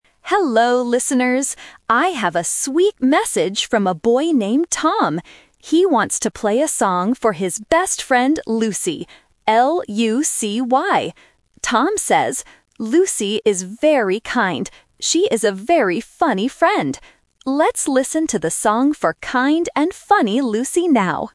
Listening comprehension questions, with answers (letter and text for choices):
Listen to the monologue and circle the correct answer for each question.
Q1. Who is the message from?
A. Tim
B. Tom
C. Lucy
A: B. Tom

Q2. What is the best friend's name?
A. Lacey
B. Roxy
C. Lucy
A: C. Lucy

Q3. How does Tom describe his best friend?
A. Kind and funny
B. Kind and lazy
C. Happy and noisy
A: A. Kind and funny

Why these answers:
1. The correct answer is (B). The announcer says, "I have a sweet message from a boy named Tom." Option (A) "Tim" is a sound trap because it sounds very similar to Tom. Option (C) "Lucy" is a trap because she is the person receiving the song, not the person sending the message.
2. The correct answer is (C). The announcer spells the name clearly: "L-U-C-Y." Options (A) "Lacey" and (B) "Roxy" are sound traps because they end with a similar "y" sound.
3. The correct answer is (A). The announcer reads Tom's message: "Lucy is very kind. She is a very funny friend." Option (B) "Kind and lazy" uses one correct word but adds a wrong word. Option (C) "Happy and noisy" is never mentioned in the audio.

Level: A1